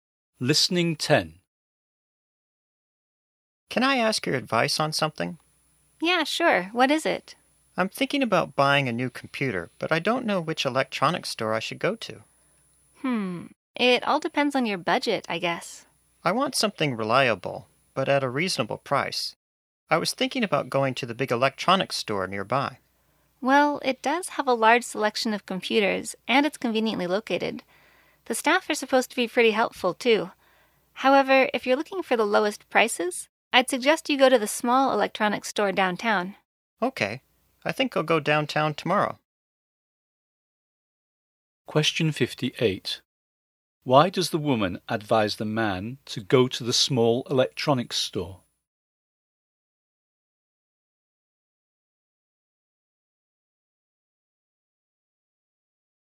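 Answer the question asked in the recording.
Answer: It has the lowest prices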